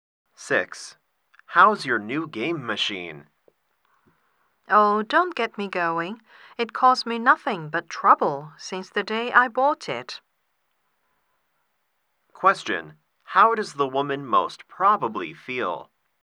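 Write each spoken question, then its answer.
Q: How does the woman most probably feel?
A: Annoyed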